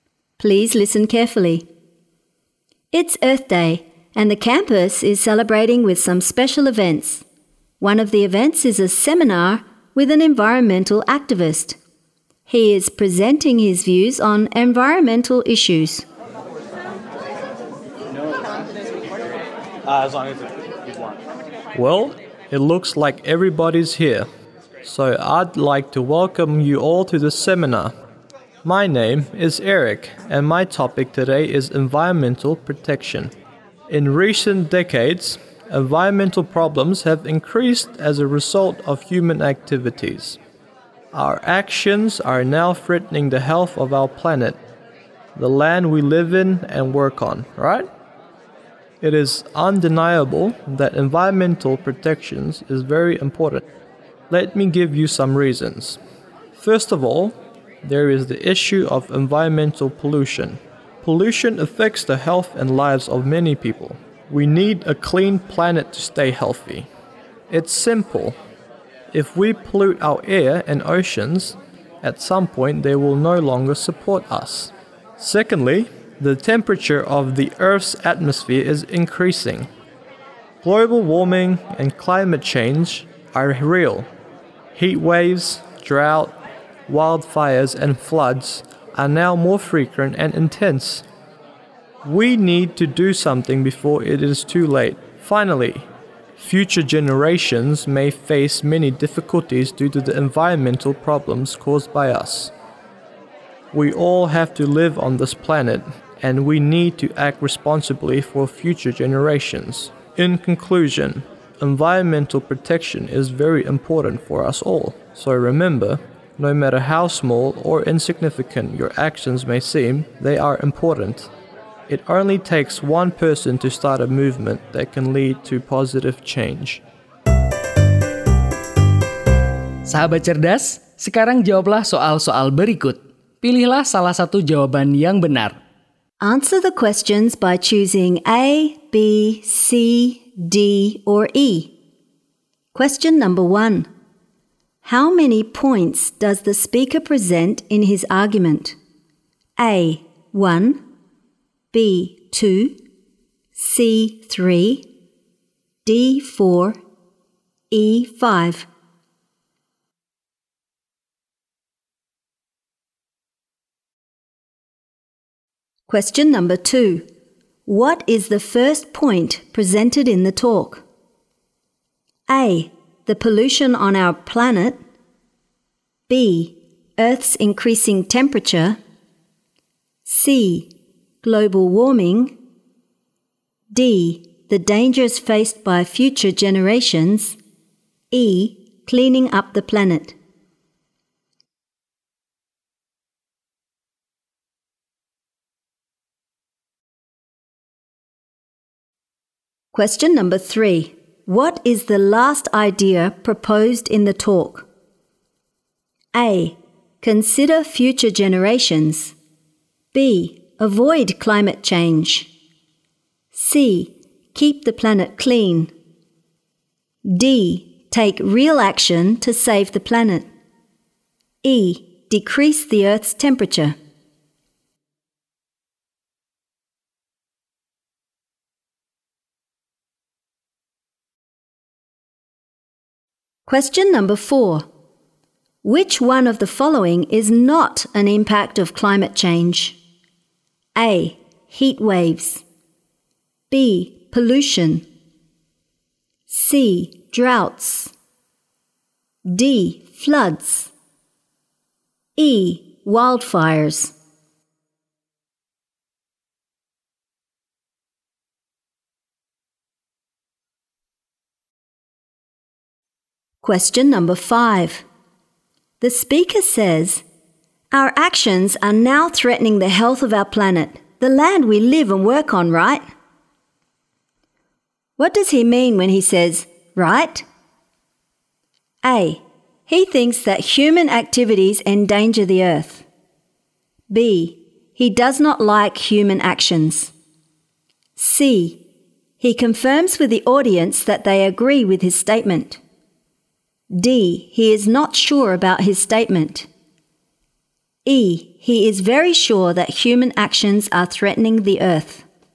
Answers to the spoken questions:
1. C. 3
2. A. The pollution on our planet.
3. Consider future generations.
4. B. Pollution.
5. C. He confirms with the audience that they agree with his statement.